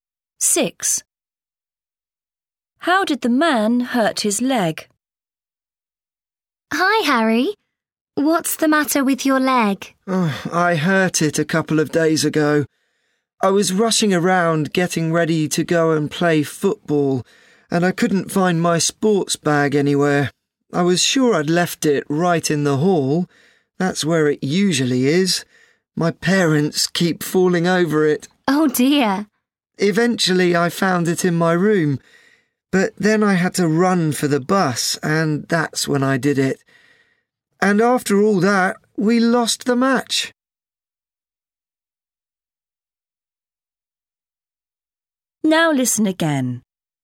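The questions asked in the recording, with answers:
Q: How did the man hurt his leg?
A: running for the bus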